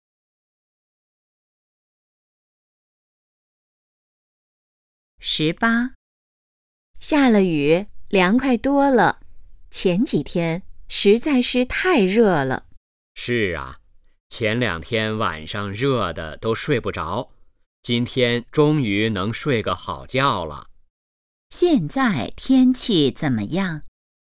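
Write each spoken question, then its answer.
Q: 现在天气怎么样?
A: 凉快多了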